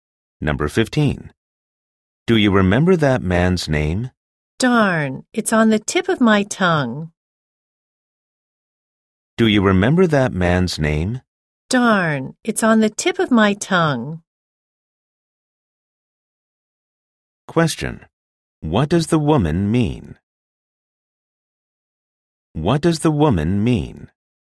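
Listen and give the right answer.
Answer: She almost remembers the name but can't recall it right now.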